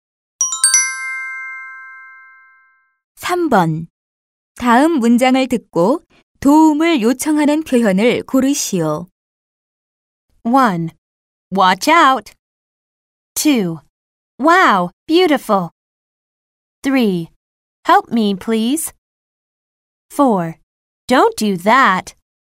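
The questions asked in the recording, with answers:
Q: 다음 문장을 듣고 도움을 요청하는 표현을 고르시오.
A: 3: Help me, please.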